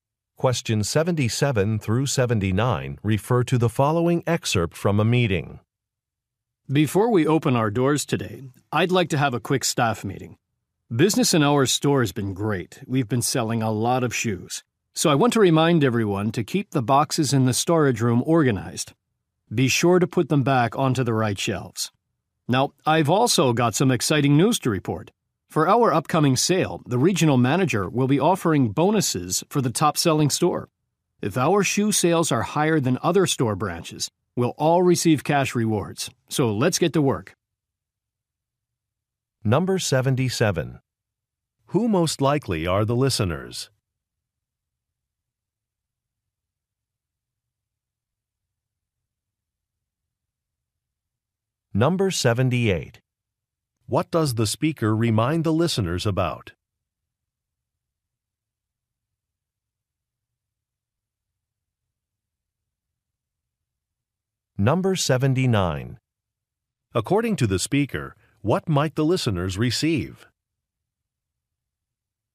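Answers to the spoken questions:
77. Shoe store employees
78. Keeping the storage room boxes organized
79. Cash rewards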